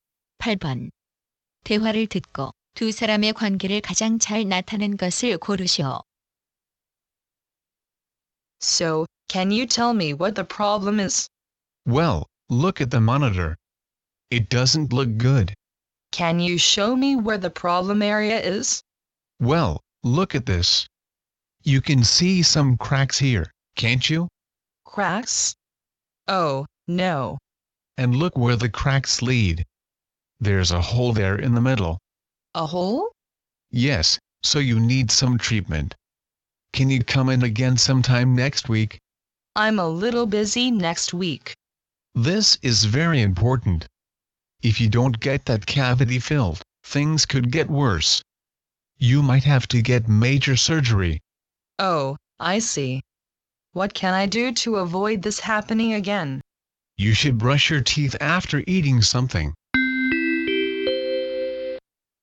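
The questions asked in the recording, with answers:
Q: 대화를 듣고 두 사람의 관계를 가장 잘 나타낸 것을 고르시오.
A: 치과의사와 환자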